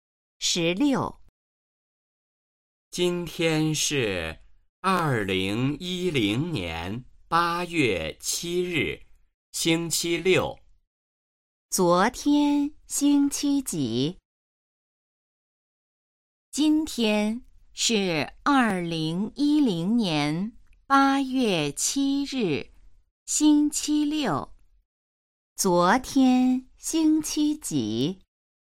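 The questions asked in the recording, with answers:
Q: 昨天星期几?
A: 星期五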